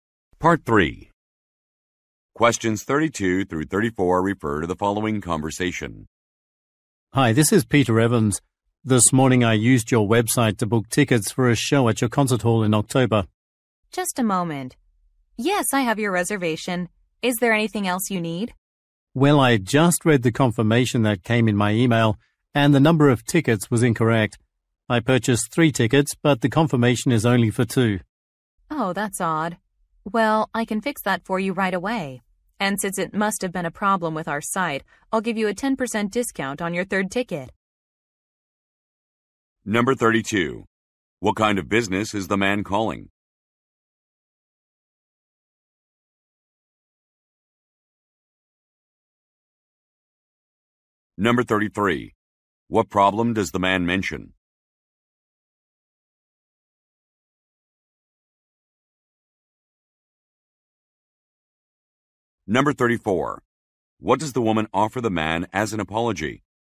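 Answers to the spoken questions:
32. A concert hall
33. The confirmation shows the wrong number of tickets (2 instead of 3)
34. A 10% discount on his third ticket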